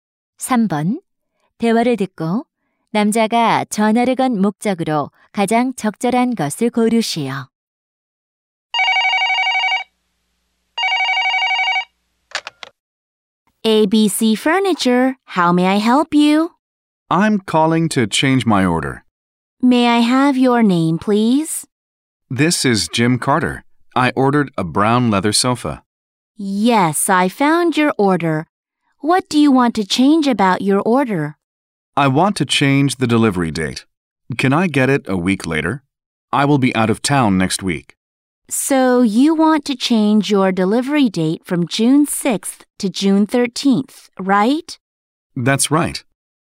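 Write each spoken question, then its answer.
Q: 대화를 듣고 남자가 전화를 건 목적으로 가장 적절한 것을 고르시오.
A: 배송 날짜를 변경하려고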